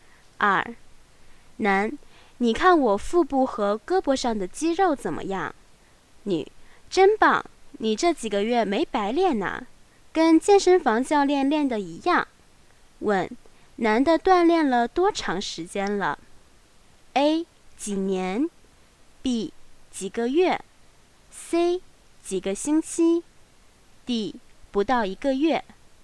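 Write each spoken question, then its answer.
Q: 问,男的锻炼了多长时间了?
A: B: 几个月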